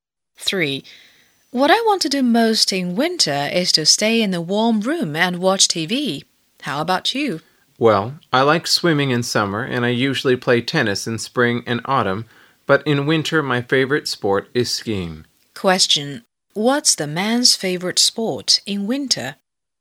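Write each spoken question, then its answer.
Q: What's the man's favorite sport in winter?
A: Skiing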